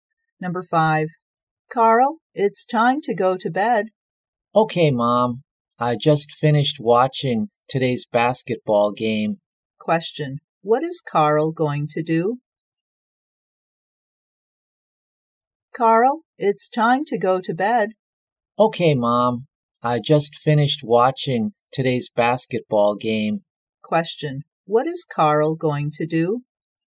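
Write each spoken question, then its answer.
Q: What is Carl going to do?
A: Go to bed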